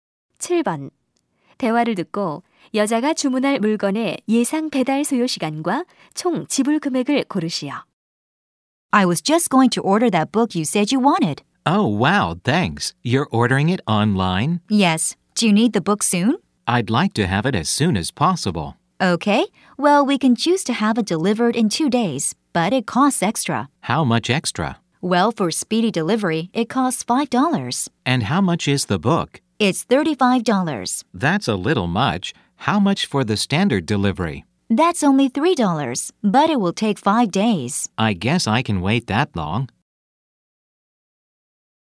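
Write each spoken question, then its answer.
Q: 대화를 듣고 여자가 주문할 물건의 예상 배달 소요 시간과 총 지불 금액을 고르시오.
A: 5일, 38달러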